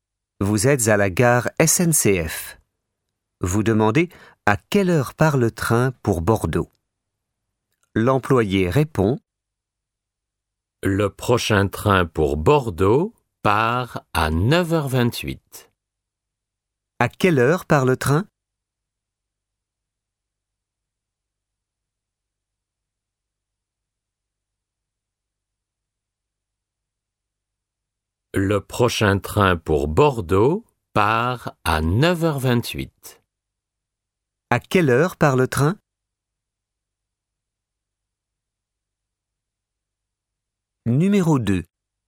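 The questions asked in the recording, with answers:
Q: À quelle heure part le train?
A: À 9h28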